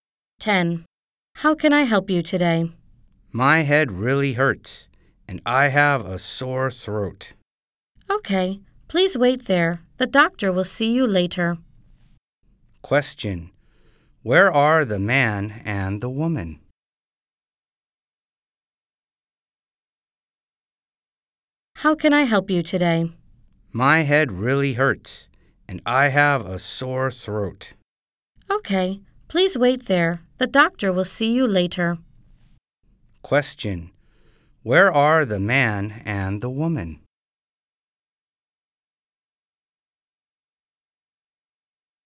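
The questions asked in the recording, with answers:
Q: Where are the man and the woman?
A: At a hospital/clinic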